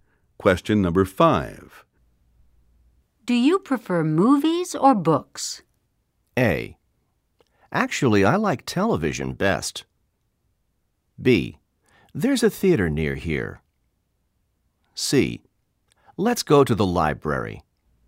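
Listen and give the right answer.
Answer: A: Actually, I like television best.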